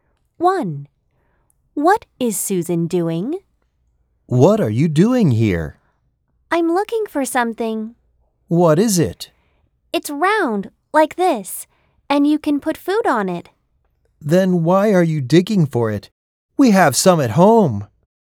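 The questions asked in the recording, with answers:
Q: What is Susan doing?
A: Digging for a plate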